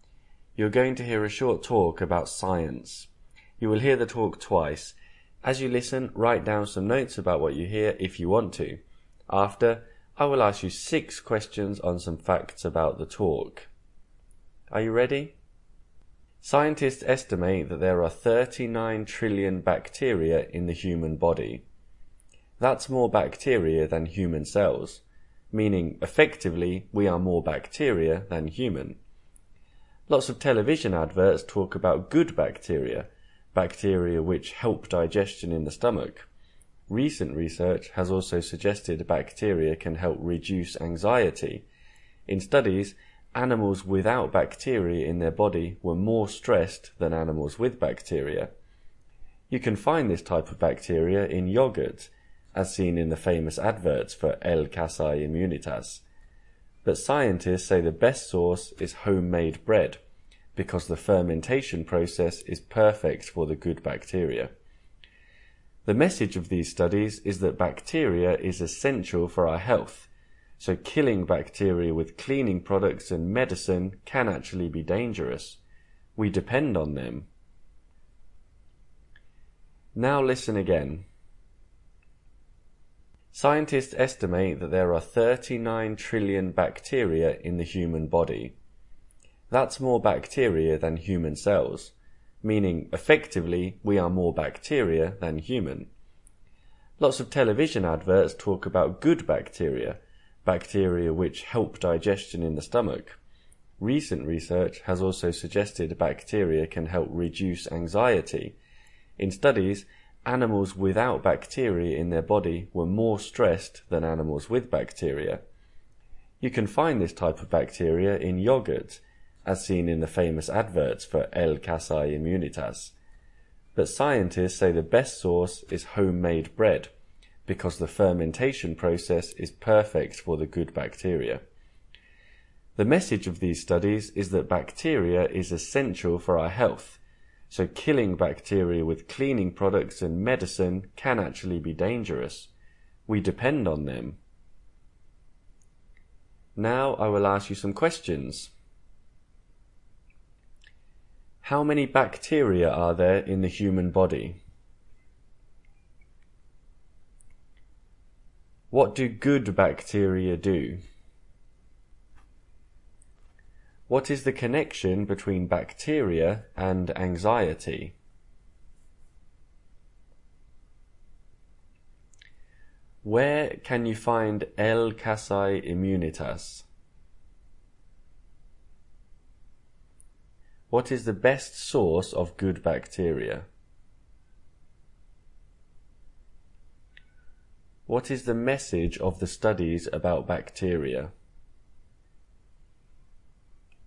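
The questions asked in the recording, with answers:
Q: How many bacteria are there in the human body?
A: 39 trillion

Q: What do good bacteria do?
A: Help digestion in the stomach

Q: What is the connection between bacteria and anxiety?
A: Bacteria can help reduce anxiety

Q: What is the best source of good bacteria?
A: Homemade bread

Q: What is the message of the studies about bacteria?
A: Bacteria is essential for our health; killing it can be dangerous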